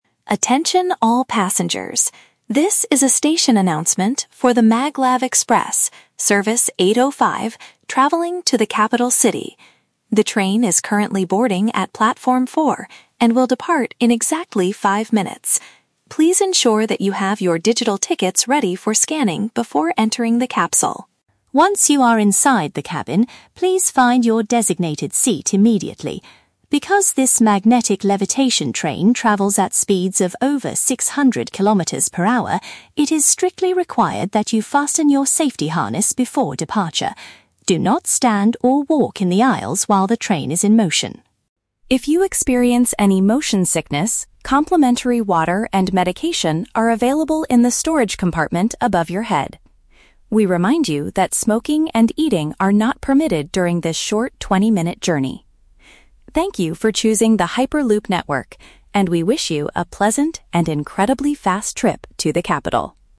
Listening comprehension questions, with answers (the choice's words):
Listen to a station announcement and choose the correct answer (A, B, or C) for each question.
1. What do passengers need to do before getting on the train?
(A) Prepare their electronic passes for checking.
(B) Wait at Platform 4 for at least five more minutes.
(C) Show their identity cards to the station security.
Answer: Prepare their electronic passes for checking.

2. Why must travelers secure their seatbelts?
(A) Because the journey takes a very long time.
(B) Because the vehicle moves at an extremely high speed.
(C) Because the magnetic tracks are currently being repaired.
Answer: Because the vehicle moves at an extremely high speed.

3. What is available if a passenger feels unwell during the trip?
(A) They can buy hot food from the storage area.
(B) They can get free medicine from the overhead bins.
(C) They can ask the automated system to stop the vehicle.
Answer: They can get free medicine from the overhead bins.

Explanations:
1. The announcer tells passengers to have their "digital tickets ready for scanning." "Electronic passes" is a paraphrase for digital tickets, and "checking" means scanning.
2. The announcer says it is required to fasten safety harnesses (seatbelts) because the train "travels at speeds of over 600 kilometers per hour," which means it moves at an extremely high speed.
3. The announcer says that if you experience motion sickness (feel unwell), "complimentary water and medication are available in the storage compartment above your head." "Free medicine" means complimentary medication, and "overhead bins" are storage compartments above your head.

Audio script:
Station Announcer: Attention all passengers. This is a station announcement for the Maglev Express, Service 805, traveling to the Capital City. The train is currently boarding at Platform 4 and will depart in exactly five minutes. Please ensure that you have your digital tickets ready for scanning before entering the capsule.
Once you are inside the cabin, please find your designated seat immediately. Because this magnetic levitation train travels at speeds of over 600 kilometers per hour, it is strictly required that you fasten your safety harness before departure. Do not stand or walk in the aisles while the train is in motion.
If you experience any motion sickness, complimentary water and medication are available in the storage compartment above your head. We remind you that smoking and eating are not permitted during this short 20-minute journey. Thank you for choosing the Hyperloop network, and we wish you a pleasant and incredibly fast trip to the capital.